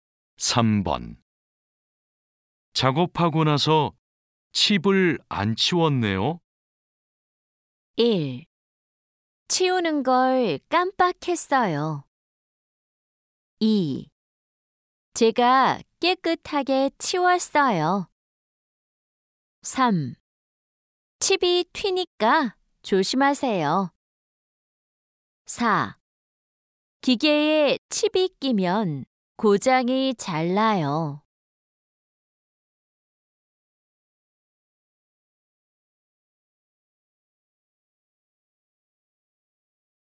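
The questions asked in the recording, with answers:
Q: 작업하고 나서 칩을 안 치웠네요.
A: 1: 치우는 걸 깜빡했어요.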